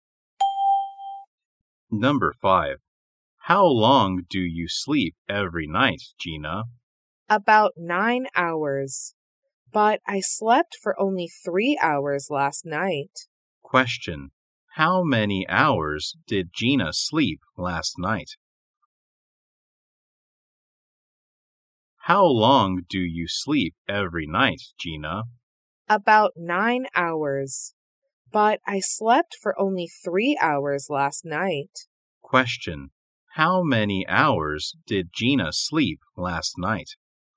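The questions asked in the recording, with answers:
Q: How many hours did Gina sleep last night?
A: 3 hours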